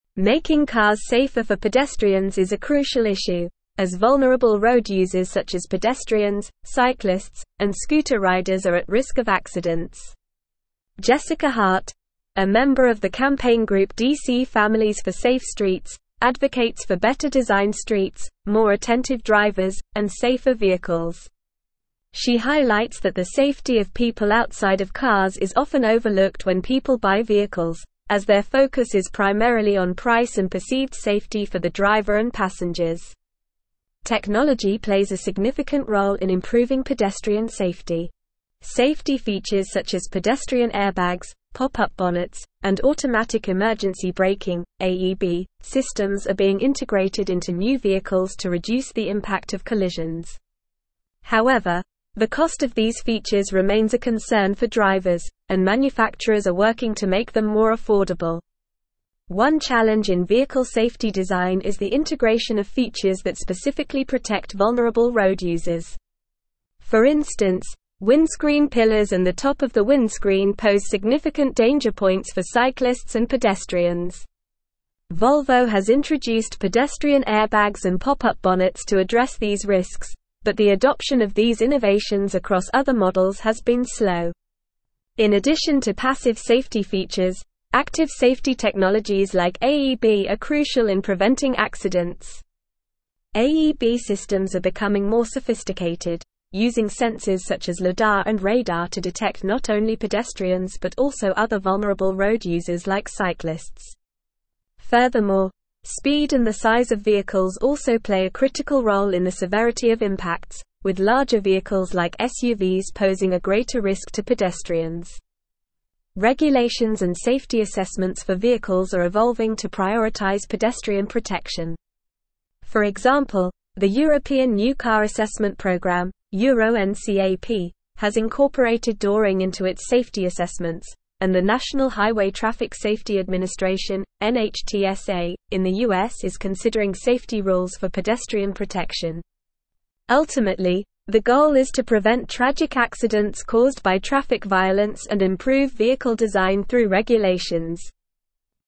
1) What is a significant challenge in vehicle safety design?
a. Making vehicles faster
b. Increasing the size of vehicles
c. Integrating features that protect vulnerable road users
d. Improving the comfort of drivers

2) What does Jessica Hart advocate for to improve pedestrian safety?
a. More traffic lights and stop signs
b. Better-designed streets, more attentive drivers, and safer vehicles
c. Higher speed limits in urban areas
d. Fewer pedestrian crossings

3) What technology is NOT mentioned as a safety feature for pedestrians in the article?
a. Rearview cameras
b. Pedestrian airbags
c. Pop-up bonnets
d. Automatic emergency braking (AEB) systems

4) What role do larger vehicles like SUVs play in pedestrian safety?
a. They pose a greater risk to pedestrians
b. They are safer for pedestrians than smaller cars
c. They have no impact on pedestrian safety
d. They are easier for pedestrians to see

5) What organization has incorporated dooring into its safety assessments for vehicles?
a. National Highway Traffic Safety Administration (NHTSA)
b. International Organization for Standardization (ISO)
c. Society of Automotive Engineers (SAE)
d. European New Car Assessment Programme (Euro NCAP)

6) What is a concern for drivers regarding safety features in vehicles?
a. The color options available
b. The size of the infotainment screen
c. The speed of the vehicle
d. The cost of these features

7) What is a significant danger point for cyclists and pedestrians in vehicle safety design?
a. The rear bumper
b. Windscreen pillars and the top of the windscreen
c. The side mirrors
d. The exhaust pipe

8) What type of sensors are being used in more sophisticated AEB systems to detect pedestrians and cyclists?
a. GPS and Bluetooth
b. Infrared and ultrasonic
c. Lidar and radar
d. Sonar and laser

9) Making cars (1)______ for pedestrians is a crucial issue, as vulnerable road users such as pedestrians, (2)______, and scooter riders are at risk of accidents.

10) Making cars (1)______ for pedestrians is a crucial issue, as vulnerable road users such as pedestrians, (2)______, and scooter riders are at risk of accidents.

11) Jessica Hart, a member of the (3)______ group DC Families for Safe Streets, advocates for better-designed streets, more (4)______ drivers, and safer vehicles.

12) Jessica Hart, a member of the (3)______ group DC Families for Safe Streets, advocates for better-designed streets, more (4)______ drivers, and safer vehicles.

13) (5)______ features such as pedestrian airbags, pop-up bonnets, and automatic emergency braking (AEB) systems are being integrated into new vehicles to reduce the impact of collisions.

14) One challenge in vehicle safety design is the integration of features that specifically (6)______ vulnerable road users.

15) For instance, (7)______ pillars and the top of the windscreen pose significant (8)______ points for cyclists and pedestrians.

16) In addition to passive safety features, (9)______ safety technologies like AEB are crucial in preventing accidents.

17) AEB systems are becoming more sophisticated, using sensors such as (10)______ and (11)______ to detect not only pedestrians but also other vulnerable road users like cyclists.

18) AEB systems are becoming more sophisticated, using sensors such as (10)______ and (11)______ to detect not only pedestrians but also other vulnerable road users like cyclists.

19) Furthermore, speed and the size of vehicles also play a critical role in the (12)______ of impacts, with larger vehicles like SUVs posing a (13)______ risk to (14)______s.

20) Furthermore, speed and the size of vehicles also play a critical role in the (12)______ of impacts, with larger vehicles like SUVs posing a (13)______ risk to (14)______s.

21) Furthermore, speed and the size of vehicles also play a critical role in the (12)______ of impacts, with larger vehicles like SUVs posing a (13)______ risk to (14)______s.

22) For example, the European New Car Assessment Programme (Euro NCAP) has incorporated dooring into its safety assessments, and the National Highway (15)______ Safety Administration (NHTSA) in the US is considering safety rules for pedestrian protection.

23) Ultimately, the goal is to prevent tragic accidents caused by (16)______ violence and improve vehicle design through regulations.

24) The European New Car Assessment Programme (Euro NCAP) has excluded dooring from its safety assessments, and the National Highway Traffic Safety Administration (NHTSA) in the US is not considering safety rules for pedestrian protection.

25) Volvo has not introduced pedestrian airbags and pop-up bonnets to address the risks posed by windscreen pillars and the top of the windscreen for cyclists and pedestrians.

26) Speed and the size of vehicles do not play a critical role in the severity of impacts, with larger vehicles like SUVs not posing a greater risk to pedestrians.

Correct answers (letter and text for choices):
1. c. Integrating features that protect vulnerable road users
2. b. Better-designed streets, more attentive drivers, and safer vehicles
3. a. Rearview cameras
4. a. They pose a greater risk to pedestrians
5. d. European New Car Assessment Programme (Euro NCAP)
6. d. The cost of these features
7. b. Windscreen pillars and the top of the windscreen
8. c. Lidar and radar
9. safer
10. cyclists
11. campaign
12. attentive
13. Safety
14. protect
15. danger
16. active
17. lidar
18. radar
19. severity
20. greater
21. pedestrian
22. Traffic
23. traffic
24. False
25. False
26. False

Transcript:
Making cars safer for pedestrians is a crucial issue, as vulnerable road users such as pedestrians, cyclists, and scooter riders are at risk of accidents. Jessica Hart, a member of the campaign group DC Families for Safe Streets, advocates for better-designed streets, more attentive drivers, and safer vehicles. She highlights that the safety of people outside of cars is often overlooked when people buy vehicles, as their focus is primarily on price and perceived safety for the driver and passengers.
Technology plays a significant role in improving pedestrian safety. Safety features such as pedestrian airbags, pop-up bonnets, and automatic emergency braking (AEB) systems are being integrated into new vehicles to reduce the impact of collisions. However, the cost of these features remains a concern for drivers, and manufacturers are working to make them more affordable.
One challenge in vehicle safety design is the integration of features that specifically protect vulnerable road users. For instance, windscreen pillars and the top of the windscreen pose significant danger points for cyclists and pedestrians. Volvo has introduced pedestrian airbags and pop-up bonnets to address these risks, but the adoption of these innovations across other models has been slow.
In addition to passive safety features, active safety technologies like AEB are crucial in preventing accidents. AEB systems are becoming more sophisticated, using sensors such as lidar and radar to detect not only pedestrians but also other vulnerable road users like cyclists. Furthermore, speed and the size of vehicles also play a critical role in the severity of impacts, with larger vehicles like SUVs posing a greater risk to pedestrians.
Regulations and safety assessments for vehicles are evolving to prioritize pedestrian protection. For example, the European New Car Assessment Programme (Euro NCAP) has incorporated dooring into its safety assessments, and the National Highway Traffic Safety Administration (NHTSA) in the US is considering safety rules for pedestrian protection. Ultimately, the goal is to prevent tragic accidents caused by traffic violence and improve vehicle design through regulations.

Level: Level 4